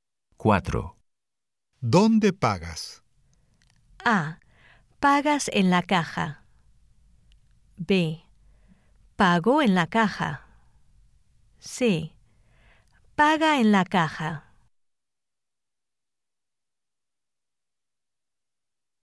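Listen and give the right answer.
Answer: B: Pago en la caja.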